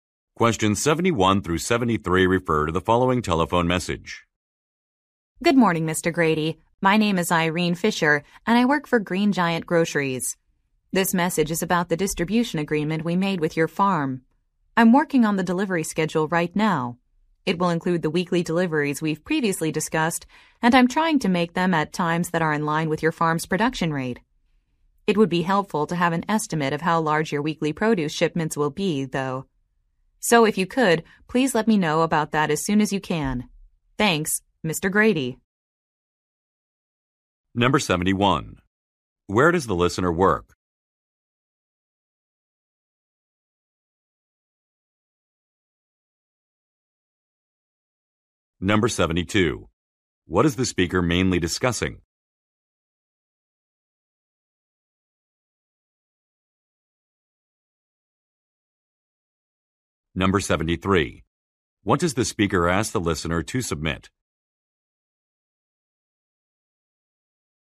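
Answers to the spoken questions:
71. On a farm
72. A delivery schedule
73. An estimate of the size of the weekly produce shipments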